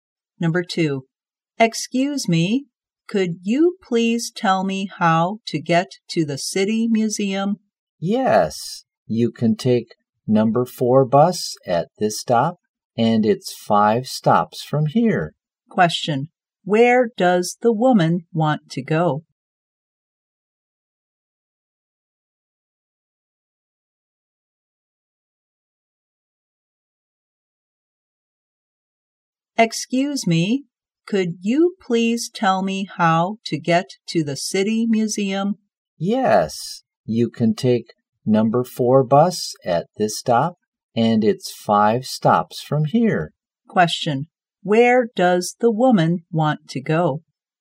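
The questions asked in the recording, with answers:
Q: where does the woman want to go?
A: The City Museum.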